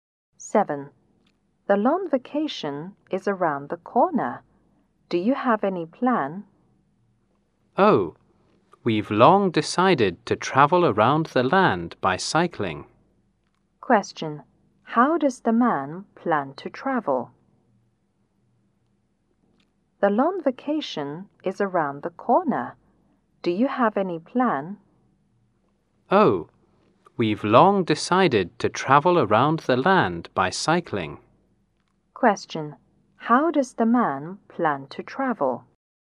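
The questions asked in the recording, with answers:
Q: How does the man plan to travel?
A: By bike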